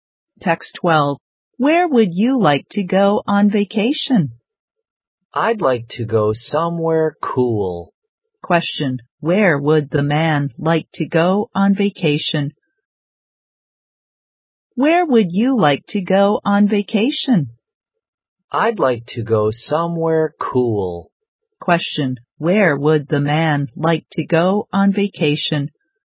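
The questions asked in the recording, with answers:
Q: Where would the man like to go on vacation?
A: Somewhere cool.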